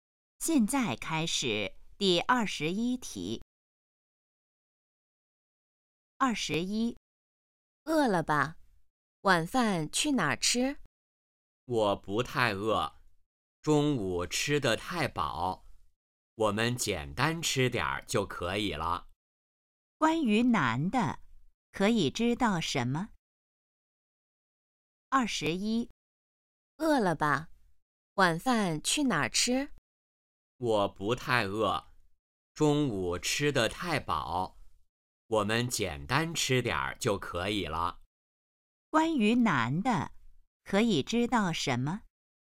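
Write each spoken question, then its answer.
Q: 关于男的,可以知道什么?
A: 不太饿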